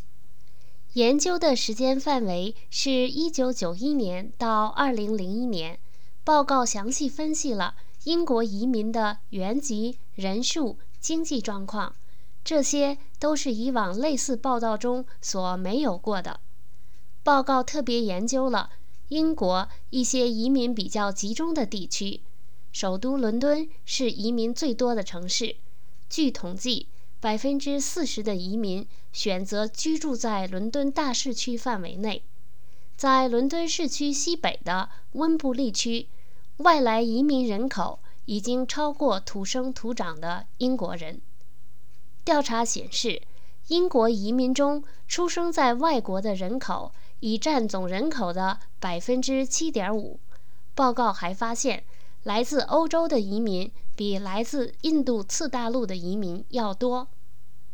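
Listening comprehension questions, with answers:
Please answer the following questions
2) 公共政策研究所的报告分析了移民英国的人的哪些状况?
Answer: 原籍、人数、经济状况

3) 在英国,移民最多的城市是哪个?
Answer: 伦敦

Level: 3rd Year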